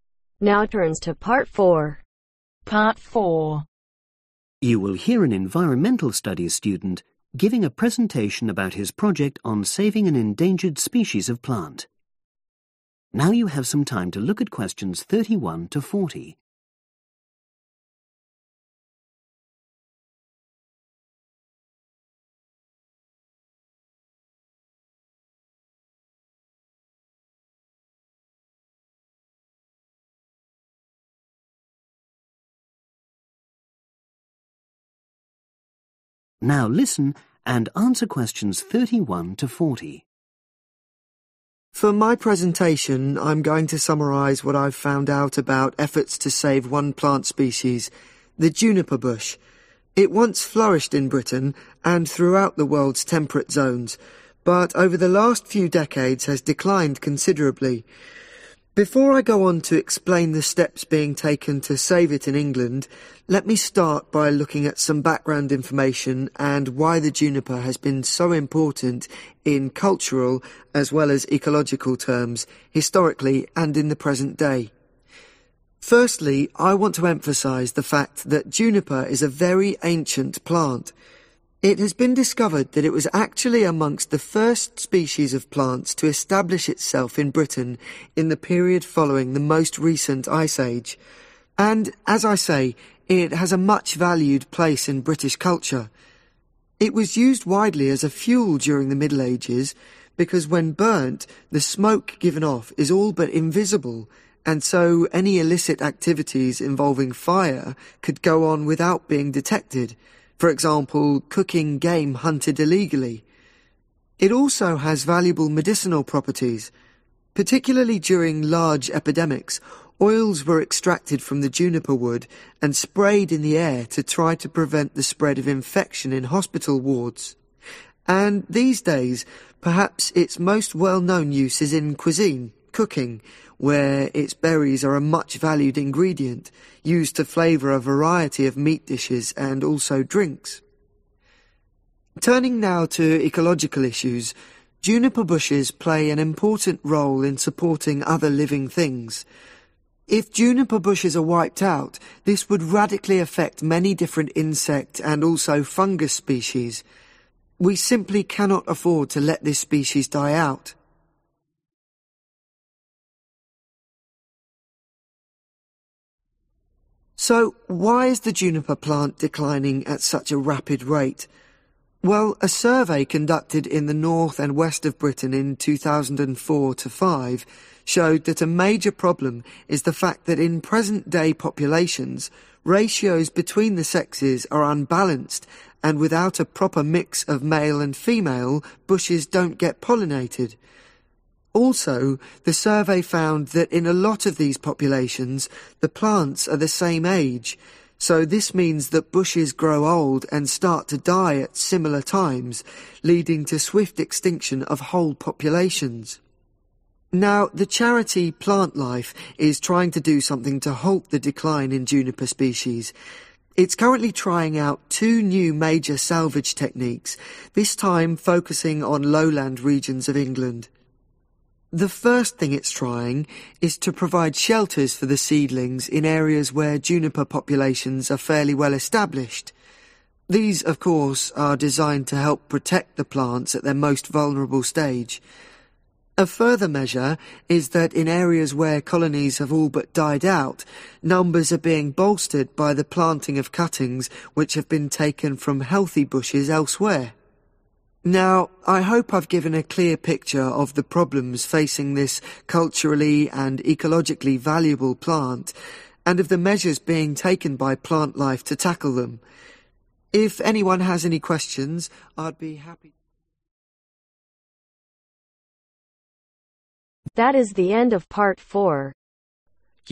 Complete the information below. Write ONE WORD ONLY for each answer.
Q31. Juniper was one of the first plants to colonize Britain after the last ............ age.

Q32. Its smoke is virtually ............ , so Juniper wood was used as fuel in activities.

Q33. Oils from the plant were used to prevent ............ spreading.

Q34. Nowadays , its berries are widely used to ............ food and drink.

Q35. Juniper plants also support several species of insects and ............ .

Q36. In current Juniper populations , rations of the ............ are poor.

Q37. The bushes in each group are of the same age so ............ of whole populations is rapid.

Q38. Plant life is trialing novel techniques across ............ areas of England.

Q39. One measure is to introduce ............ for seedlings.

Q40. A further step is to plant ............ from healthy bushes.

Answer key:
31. Ice
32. Invisible
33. Infection(s)
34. Flavour
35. Fungus / fungi
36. Sexes
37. Extinction
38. Lowland
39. Shelter(s)
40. Cuttings